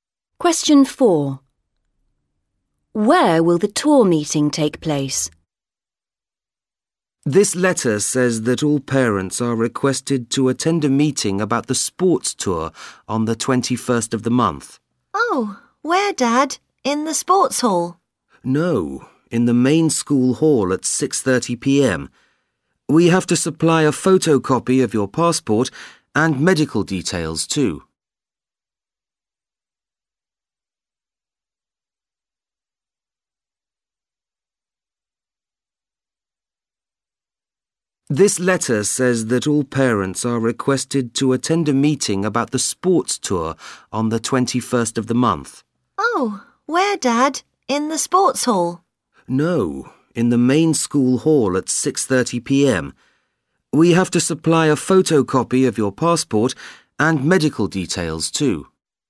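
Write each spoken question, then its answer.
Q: Where will the tour meeting take place?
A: In the main school hall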